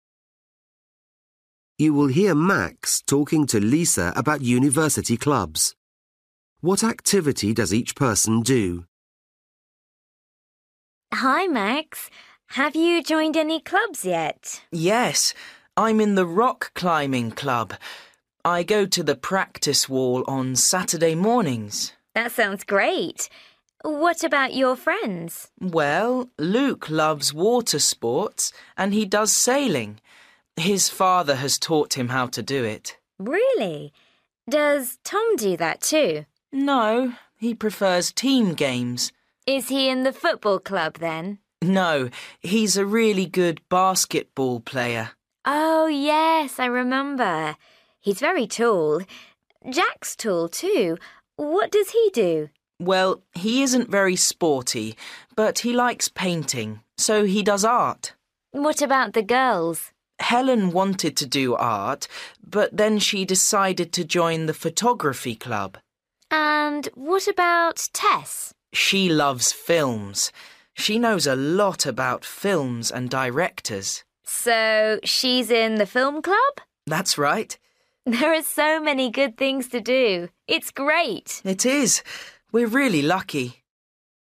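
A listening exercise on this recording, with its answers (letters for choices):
For each question, choose the correct answer.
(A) basketball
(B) art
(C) rock climbing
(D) film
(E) sailing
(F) football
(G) photography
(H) windsurfing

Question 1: Luke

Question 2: Tom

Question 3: Jack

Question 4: Helen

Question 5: Tess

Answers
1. E
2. A
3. B
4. G
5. D

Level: Luyện nghe trình độ A2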